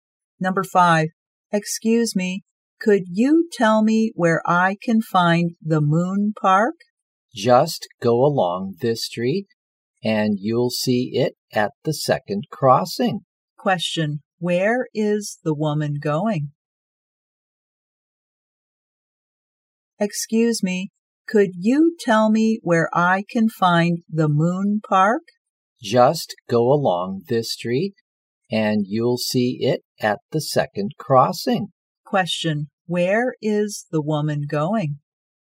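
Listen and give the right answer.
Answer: The Moon Park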